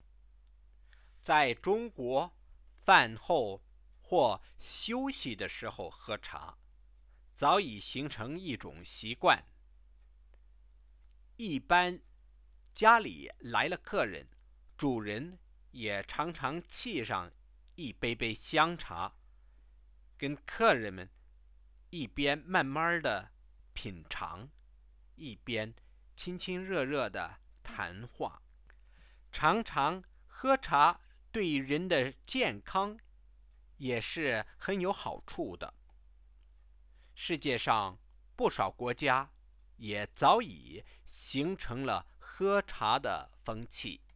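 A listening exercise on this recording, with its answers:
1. In what kind of occasions do Chinese people drink tea?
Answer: After meals, when resting, and when guests come to visit.

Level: 2nd year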